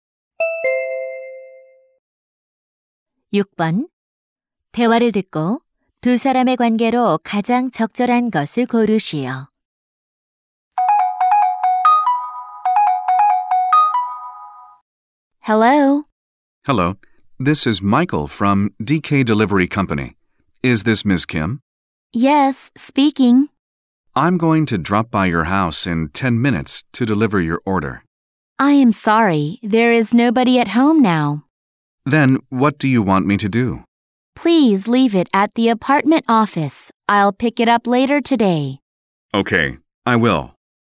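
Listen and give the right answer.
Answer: 택배 기사 - 고객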